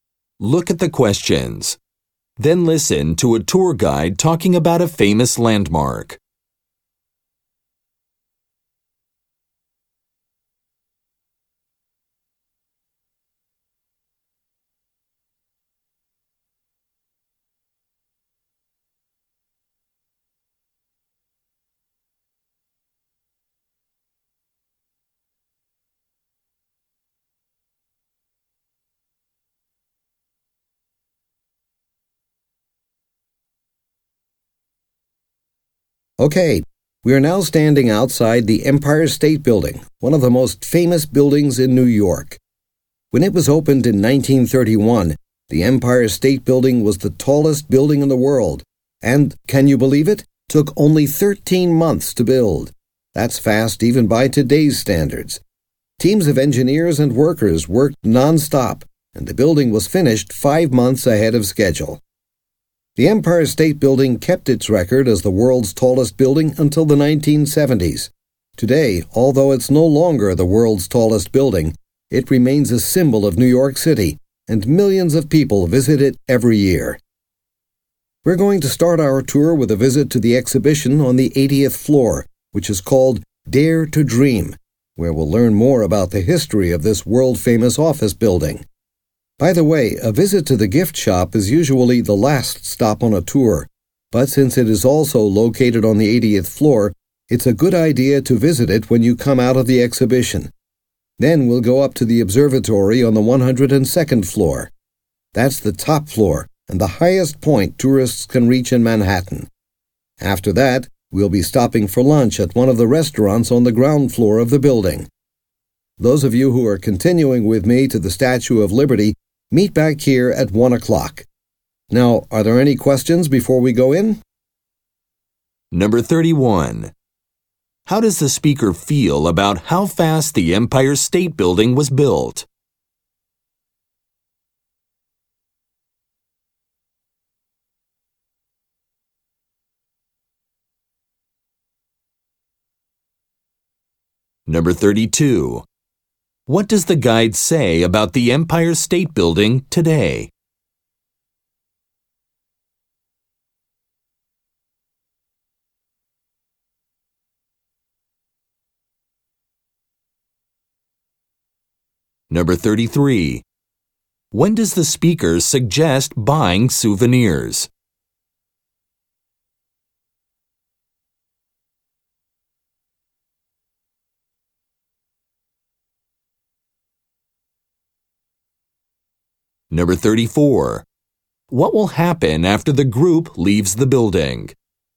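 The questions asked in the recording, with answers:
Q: How does the speaker feel about how fast the Empire State Building was built?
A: Impressed; it was very fast, even by today's standards

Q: What does the guide say about the Empire State Building today?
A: It is still a symbol of New York and millions visit it every year

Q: When does the speaker suggest buying souvenirs?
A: After coming out of the exhibition on the 80th floor

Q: What will happen after the group leaves the building?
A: Some will go on to the Statue of Liberty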